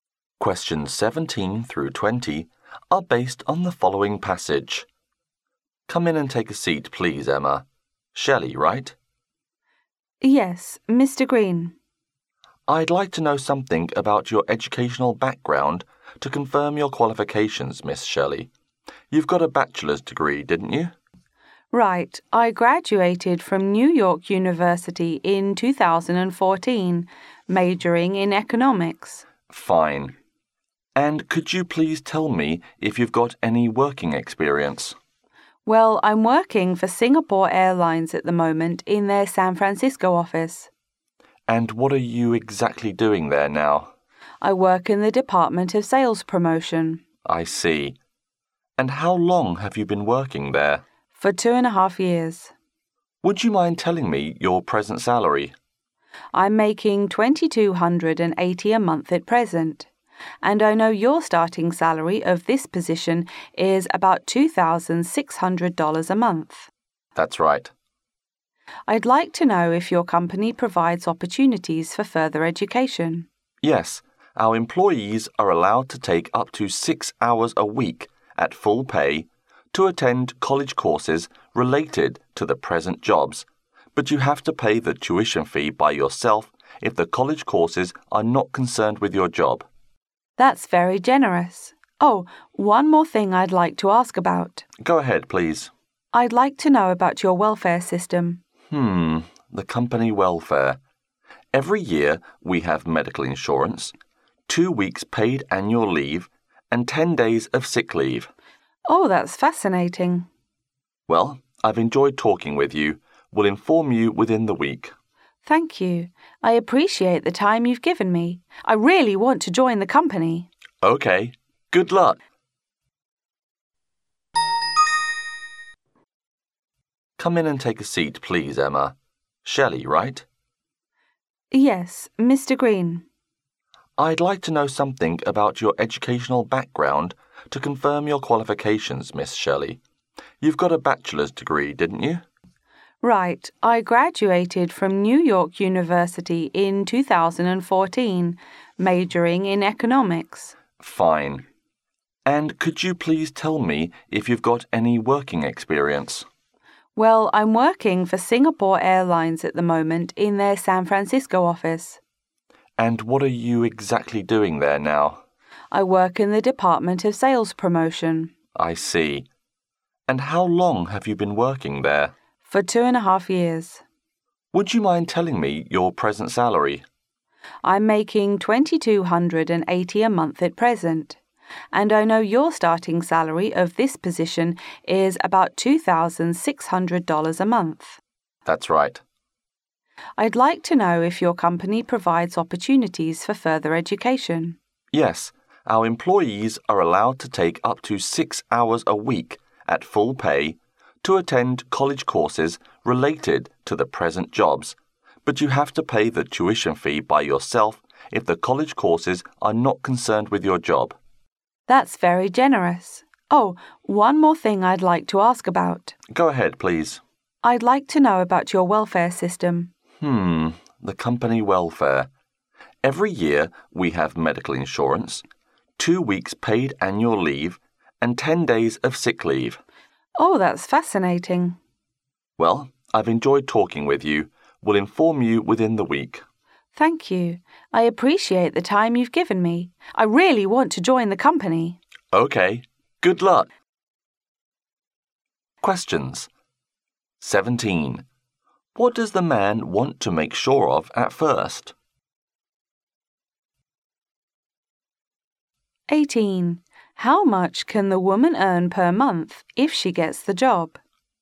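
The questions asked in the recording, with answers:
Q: What does the man want to make sure of at first?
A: Her educational background and qualifications

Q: How much can the woman earn per month if she gets the job?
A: About $2,600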